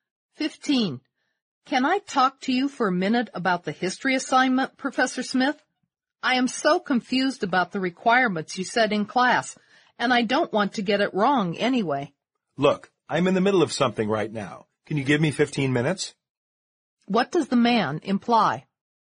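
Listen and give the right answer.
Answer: He is busy now but can talk with her in 15 minutes.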